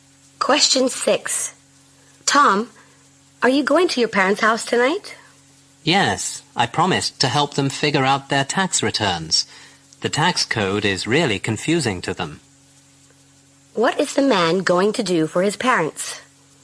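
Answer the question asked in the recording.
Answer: Help them with their tax returns.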